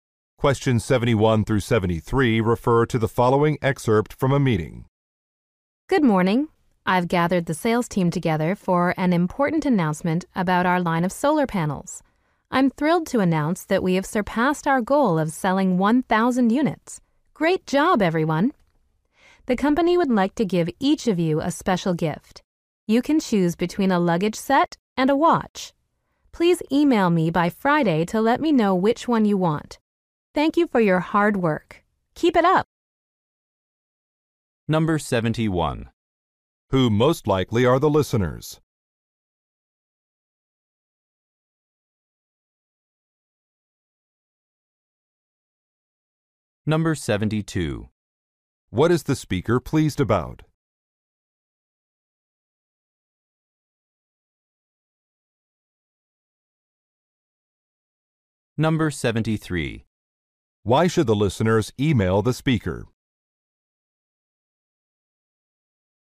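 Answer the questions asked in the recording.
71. Salespeople (the sales team)
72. A sales goal was exceeded (over 1,000 units sold)
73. To choose a gift (luggage set or watch)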